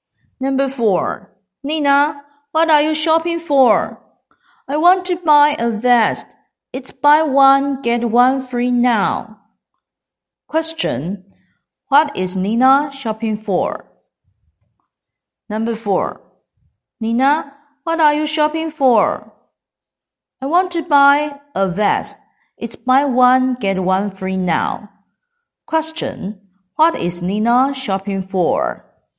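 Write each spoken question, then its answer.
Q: what is Nina shopping for?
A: A vest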